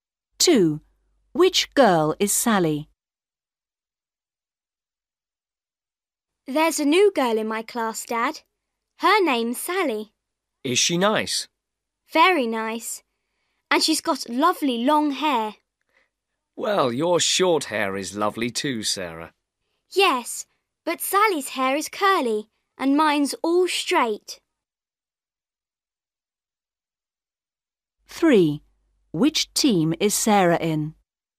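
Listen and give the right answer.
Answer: The girl with long curly hair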